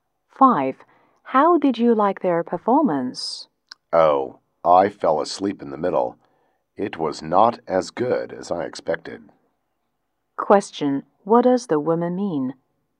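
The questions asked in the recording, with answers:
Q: What does the woman mean?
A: The performance was not as good as she expected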